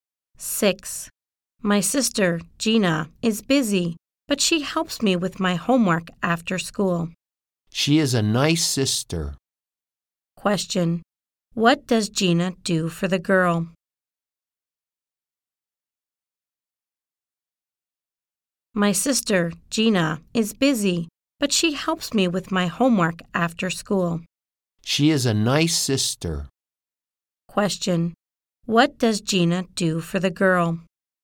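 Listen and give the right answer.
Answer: She helps her with her homework after school.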